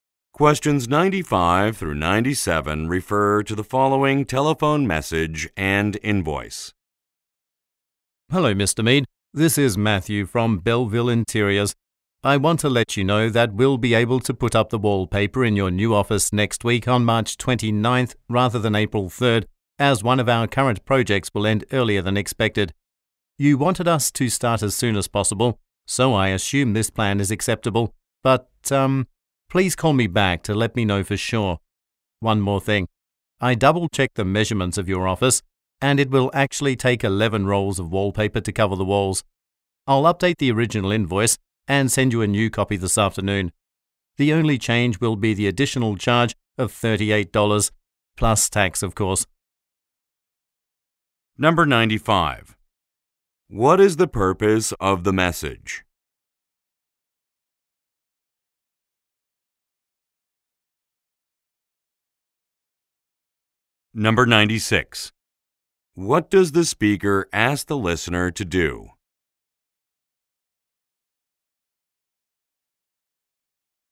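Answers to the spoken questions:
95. To move the wallpaper work to an earlier date
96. Call him back to confirm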